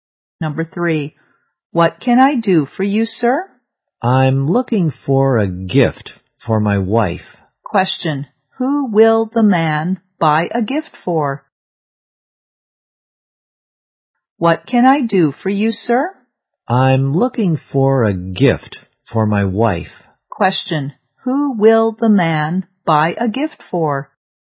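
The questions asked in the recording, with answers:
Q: Question. Who will the man buy a gift for?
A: His wife.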